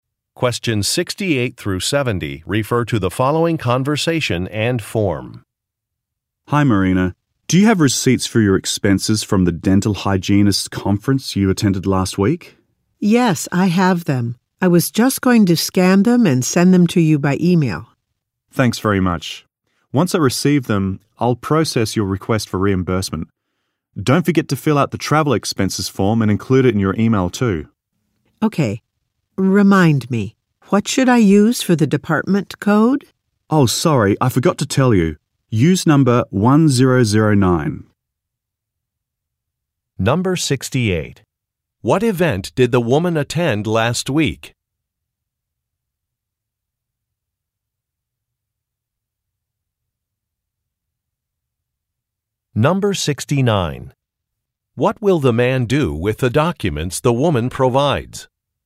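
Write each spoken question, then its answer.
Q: What event did the woman attend last week?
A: A dental hygienist conference

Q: What will the man do with the documents the woman provides?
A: Process her request for reimbursement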